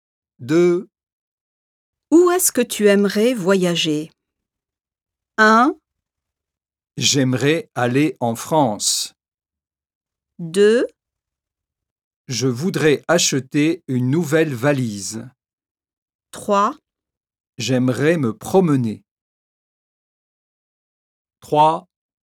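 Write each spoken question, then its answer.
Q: Où est-ce que tu aimerais voyager?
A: 1: J'aimerais aller en France.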